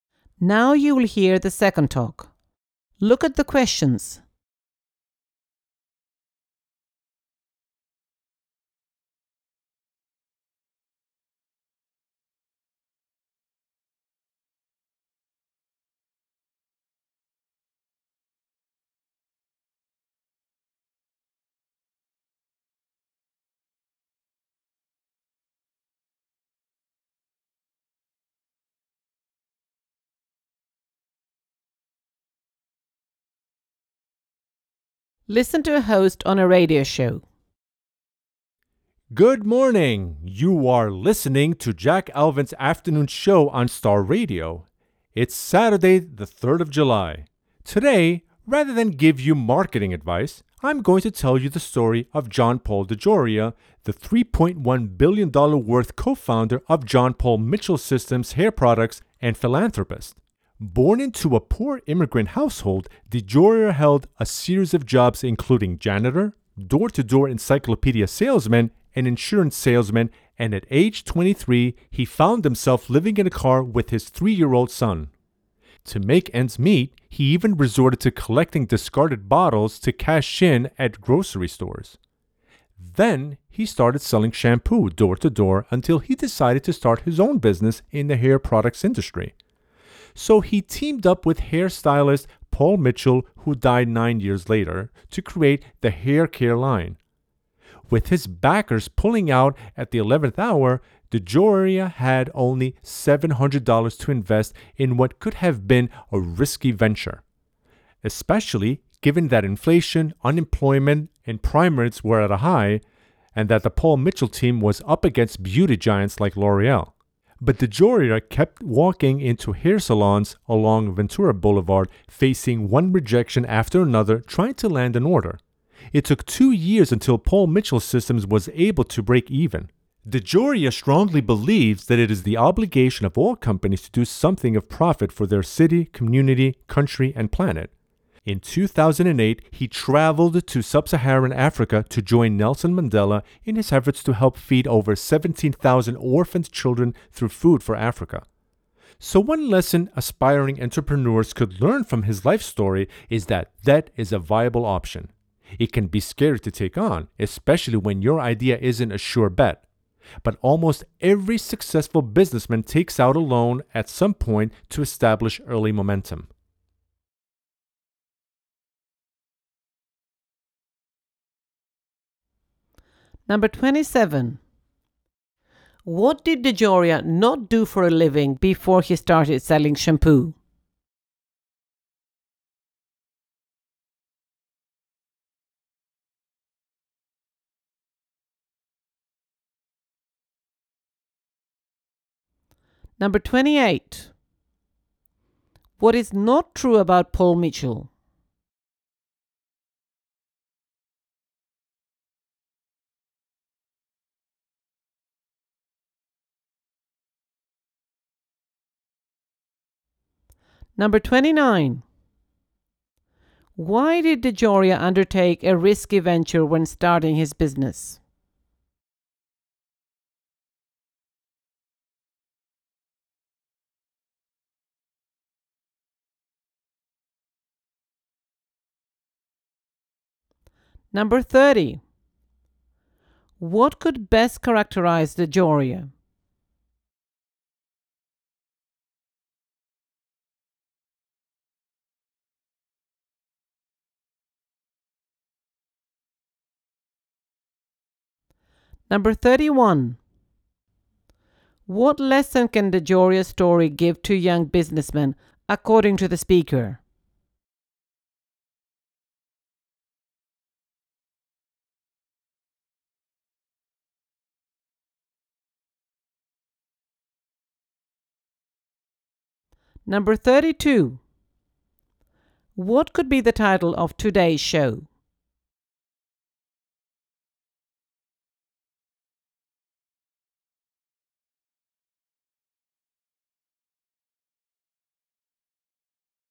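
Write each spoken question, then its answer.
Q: What lesson can DeJoria's story give to young businessmen, according to the speaker?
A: Debt is a viable option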